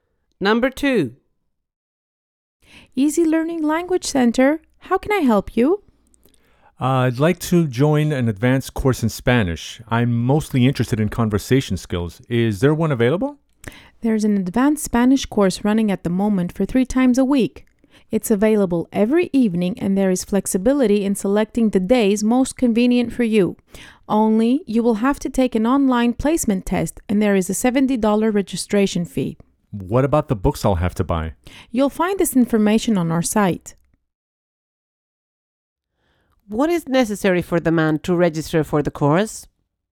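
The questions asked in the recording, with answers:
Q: What is necessary for the man to register for the course?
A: Take an online placement test and pay a $70 registration fee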